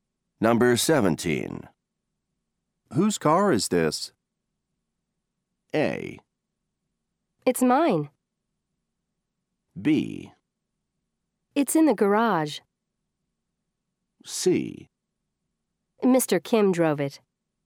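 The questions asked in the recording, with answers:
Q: Whose car is this?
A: A: It's mine.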